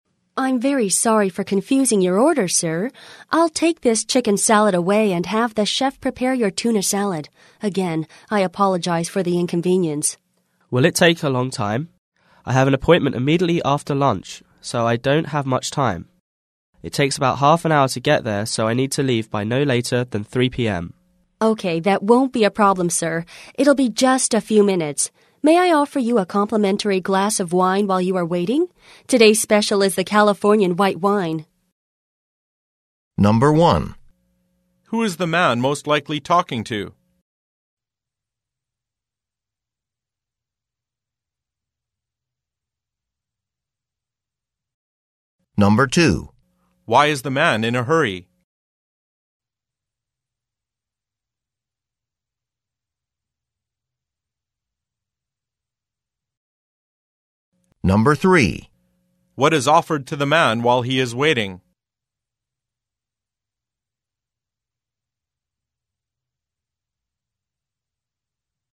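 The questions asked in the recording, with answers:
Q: Who is the man most likely talking to?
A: A waiter

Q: Why is the man in a hurry?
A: He has an appointment right after lunch

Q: What is offered to the man while he is waiting?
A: A free glass of wine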